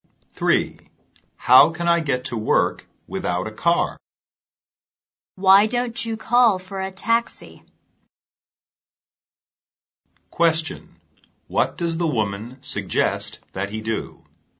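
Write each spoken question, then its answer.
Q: What does the woman suggest that he do?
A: Call for a taxi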